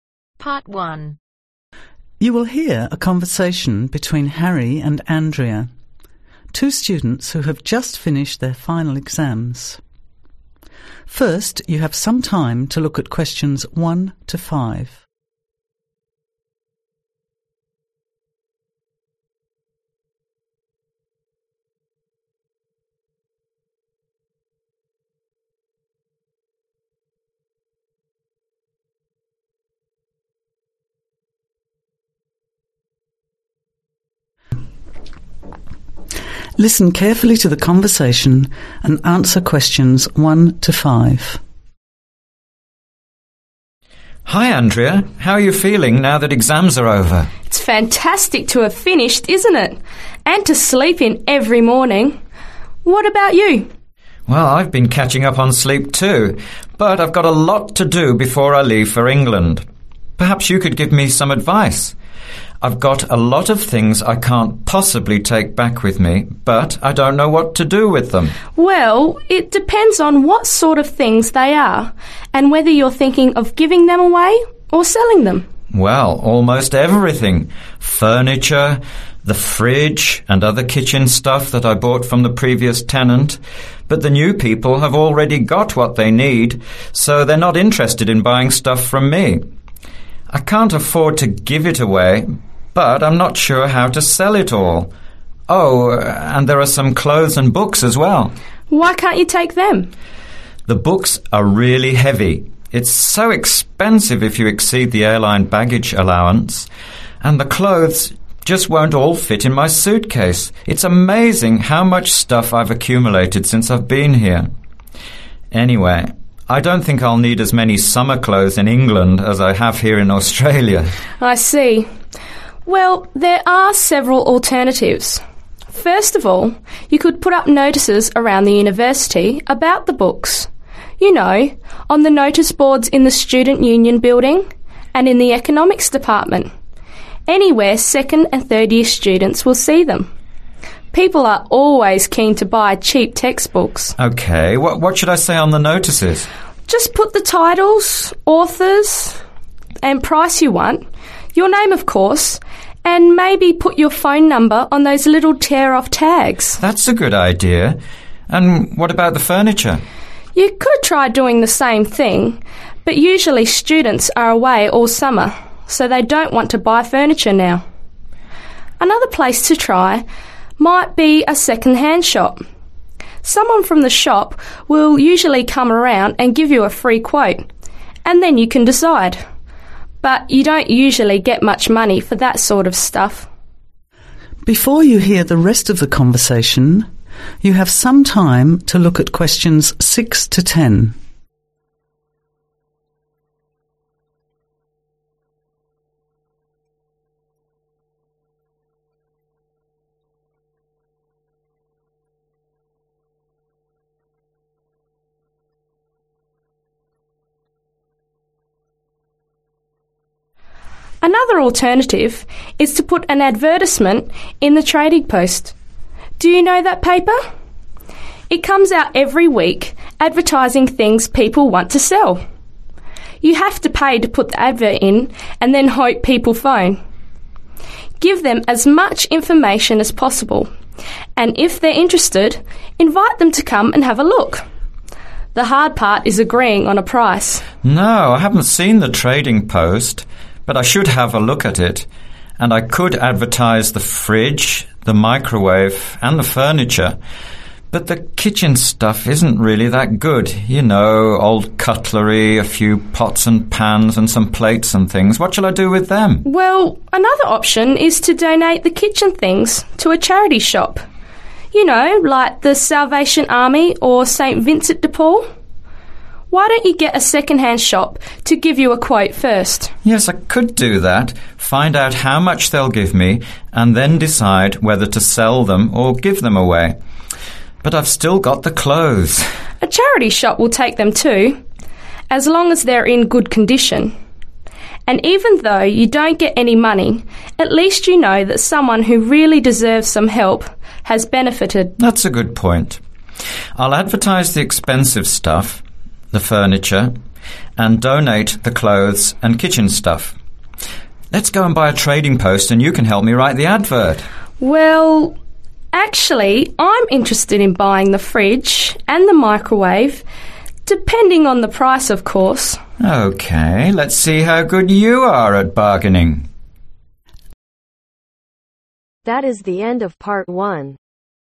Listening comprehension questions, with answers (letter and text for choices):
Circle the correct letter A-C.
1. What is Harry's problem ?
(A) He doesn't want to sell his things.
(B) What do you do with his possessions.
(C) He wants to take everything to England.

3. Where is Harry going to advertise his books for sale ?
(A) In the university bookshop.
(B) In the student newspaper.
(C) In the economics department.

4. Andrea thinks it is unlikely students will buy the furniture because ....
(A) they're all doing the same thing.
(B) they live at home.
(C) it's the summer vacation.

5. Andrea thinks that a second hand shop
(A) may not pay well.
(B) may not take your goods.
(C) may only take free goods.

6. (6)............ furniture etc in Trading Post.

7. (7)............ or sell kitchen things.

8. Get (8)............ first from second hand shop.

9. Give clothes to (9)............ shop.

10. (10)............ fridge and microwave to Andrea.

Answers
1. (B) What do you do with his possessions.
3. (C) In the economics department.
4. (C) it's the summer vacation.
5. (A) may not pay well.
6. Advertise
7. Donate
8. Quote
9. Charity
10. Sell